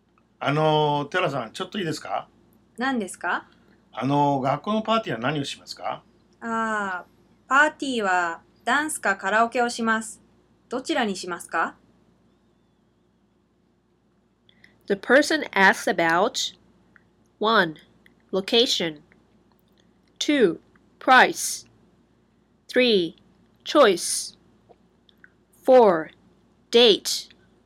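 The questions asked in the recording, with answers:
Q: The person asks about 1. Location 2. Price 3. Choice 4. Date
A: 3: Choice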